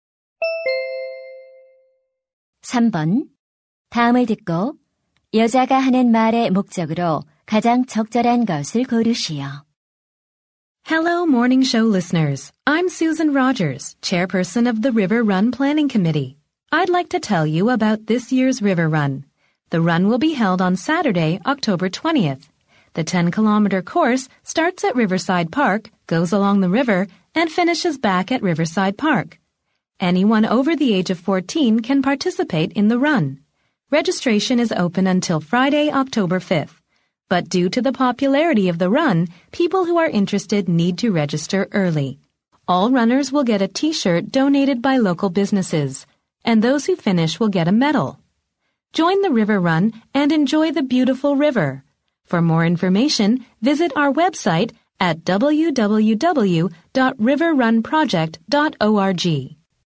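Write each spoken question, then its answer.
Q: 다음을 듣고 여자가 하는 말의 목적으로 가장 적절한 것을 고르시오.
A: River Run 행사 참가를 홍보하고 안내하려고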